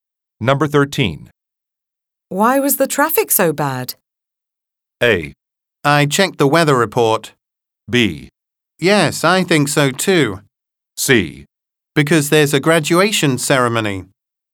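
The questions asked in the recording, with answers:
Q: Why was the traffic so bad?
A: C: Because there's a graduation ceremony.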